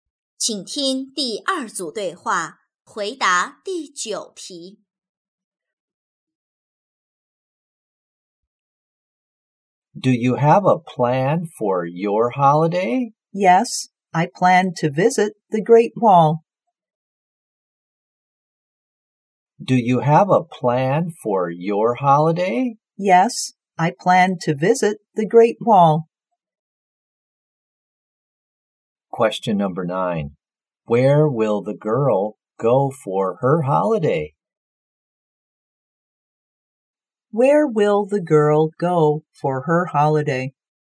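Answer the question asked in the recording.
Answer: The Great Wall.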